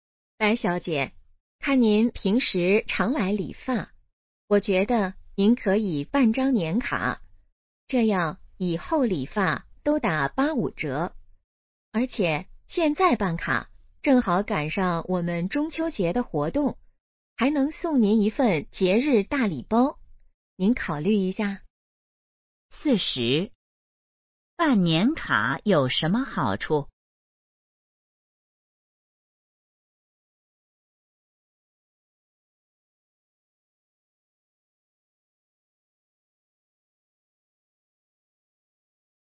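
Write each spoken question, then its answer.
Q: 办年卡有什么好处?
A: 理发打85折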